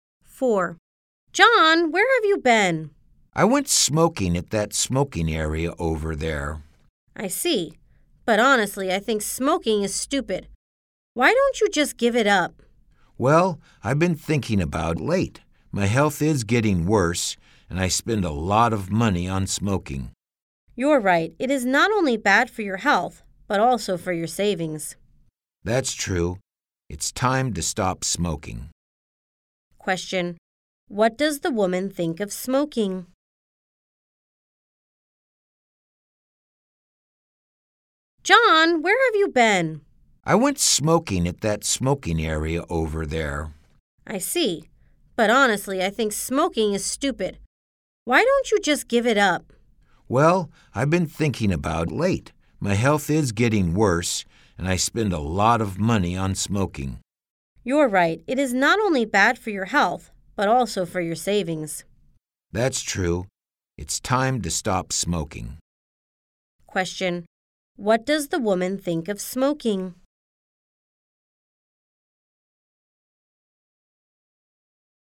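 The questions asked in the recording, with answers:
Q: What does the woman think of smoking?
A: She thinks smoking is stupid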